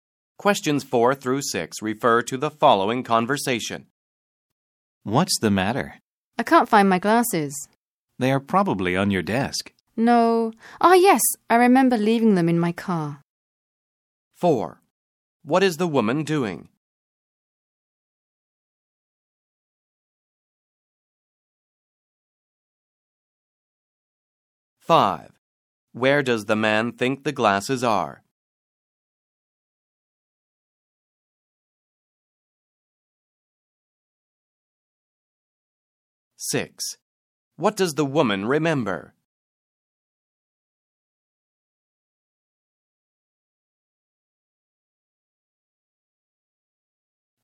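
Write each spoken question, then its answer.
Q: What is the woman doing?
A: Looking for her glasses

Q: Where does the man think the glasses are?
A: On her desk

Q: What does the woman remember?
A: She left her glasses in her car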